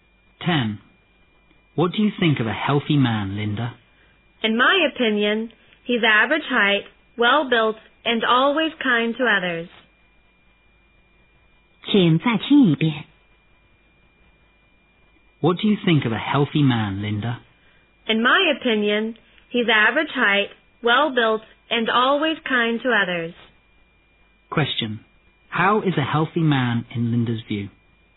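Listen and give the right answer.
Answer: Average height, well-built, and always kind to others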